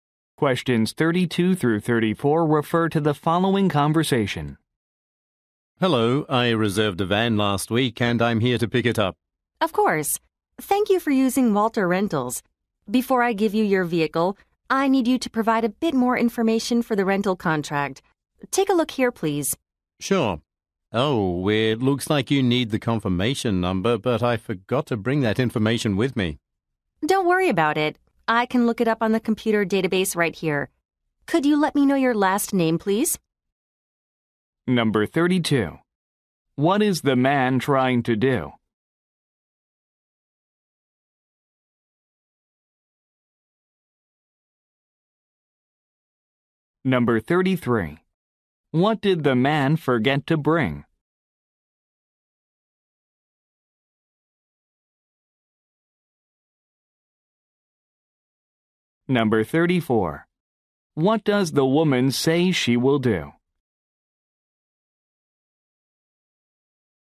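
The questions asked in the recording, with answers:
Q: What is the man trying to do?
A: Pick up a rented van

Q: What did the man forget to bring?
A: The confirmation number

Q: What does the woman say she will do?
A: Look up the information in the computer database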